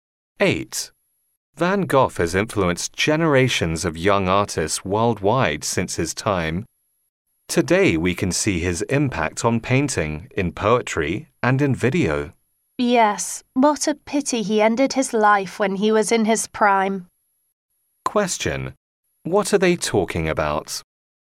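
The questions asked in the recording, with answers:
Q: What are they talking about?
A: Van Gogh and his influence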